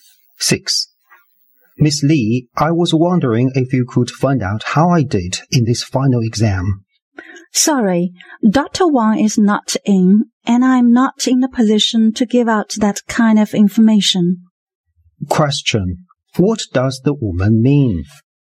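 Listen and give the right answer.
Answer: She can't give him his exam result.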